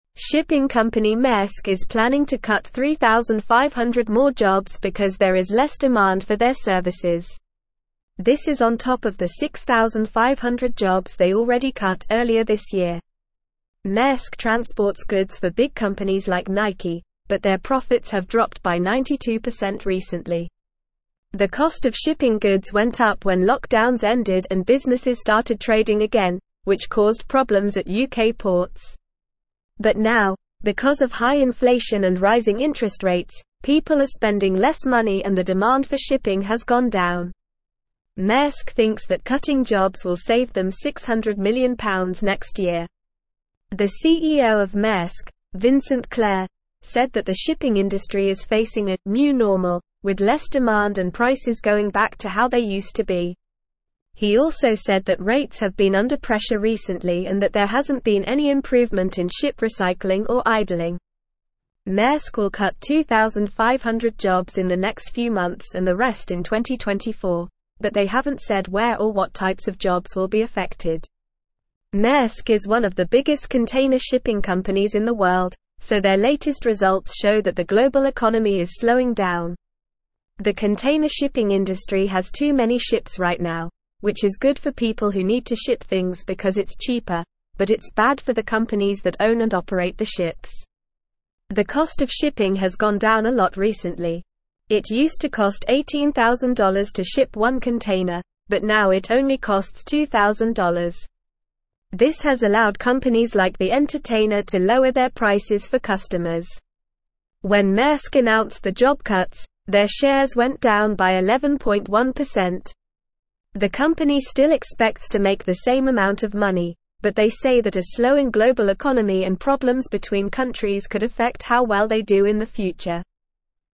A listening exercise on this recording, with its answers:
Listen and Fill in the Gaps:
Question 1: Shipping company Maersk is (1)______ to cut 3,500 more jobs because there is less demand for their services.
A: planning

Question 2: The cost of shipping goods went up when lockdowns (2)______ and businesses started (3)______ again, which caused problems at UK ports.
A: ended

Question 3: The cost of shipping goods went up when lockdowns (2)______ and businesses started (3)______ again, which caused problems at UK ports.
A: trading

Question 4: But now, because of high inflation and (4)______ interest rates, people are spending less money and the demand for shipping has gone down.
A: rising

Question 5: Maersk (5)______ that (6)______ jobs will save them £600 million next year.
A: thinks

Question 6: Maersk (5)______ that (6)______ jobs will save them £600 million next year.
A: cutting

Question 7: The CEO of Maersk, Vincent (7)______, said that the shipping industry is facing a "new normal" with less demand and prices going back to how they used to be.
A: Clerc

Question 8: He also said that rates have been under pressure recently and that there hasn't been any improvement in ship (8)______ or idling.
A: recycling

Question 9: Maersk is one of the (9)______ container (10)______ companies in the world, so their latest results show that the global economy is (11)______ down.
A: biggest

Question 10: Maersk is one of the (9)______ container (10)______ companies in the world, so their latest results show that the global economy is (11)______ down.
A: shipping

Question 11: Maersk is one of the (9)______ container (10)______ companies in the world, so their latest results show that the global economy is (11)______ down.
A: slowing

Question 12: The container shipping (12)______ has too many ships right now, which is good for people who need to ship things because it's cheaper, but it's bad for the companies that own and operate the ships.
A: industry

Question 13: This has allowed (13)______ like The Entertainer to lower their prices for customers.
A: companies

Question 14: The company still expects to make the same (14)______ of money, but they say that a slowing (15)______ economy and problems between countries could affect how well they do in the (16)______.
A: amount

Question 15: The company still expects to make the same (14)______ of money, but they say that a slowing (15)______ economy and problems between countries could affect how well they do in the (16)______.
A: global

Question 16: The company still expects to make the same (14)______ of money, but they say that a slowing (15)______ economy and problems between countries could affect how well they do in the (16)______.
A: future

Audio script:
Shipping company Maersk is planning to cut 3,500 more jobs because there is less demand for their services. This is on top of the 6,500 jobs they already cut earlier this year. Maersk transports goods for big companies like Nike, but their profits have dropped by 92% recently. The cost of shipping goods went up when lockdowns ended and businesses started trading again, which caused problems at UK ports. But now, because of high inflation and rising interest rates, people are spending less money and the demand for shipping has gone down. Maersk thinks that cutting jobs will save them £600 million next year.
The CEO of Maersk, Vincent Clerc, said that the shipping industry is facing a "new normal" with less demand and prices going back to how they used to be. He also said that rates have been under pressure recently and that there hasn't been any improvement in ship recycling or idling. Maersk will cut 2,500 jobs in the next few months and the rest in 2024, but they haven't said where or what types of jobs will be affected.
Maersk is one of the biggest container shipping companies in the world, so their latest results show that the global economy is slowing down. The container shipping industry has too many ships right now, which is good for people who need to ship things because it's cheaper, but it's bad for the companies that own and operate the ships.
It used to cost $18,000 to ship one container, but now it only costs $2,000. This has allowed companies like The Entertainer to lower their prices for customers. When Maersk announced the job cuts, their shares went down by 11.1%. The company still expects to make the same amount of money, but they say that a slowing global economy and problems between countries could affect how well they do in the future.

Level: Level 3